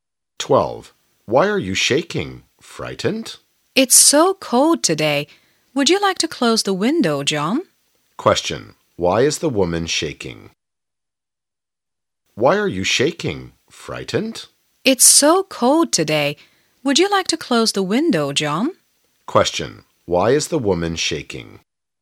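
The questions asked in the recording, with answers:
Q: Why is the woman shaking?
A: Because it's so cold today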